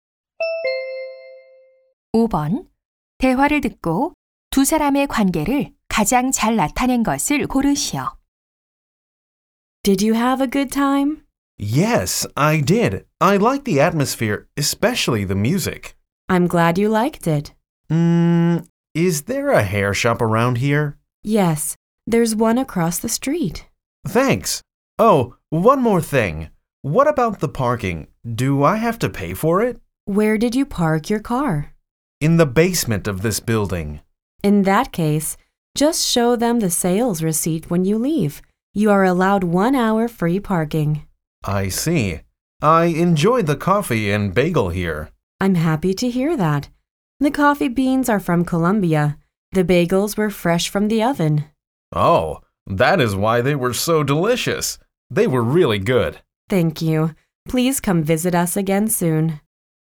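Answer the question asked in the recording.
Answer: 카페 직원 – 손님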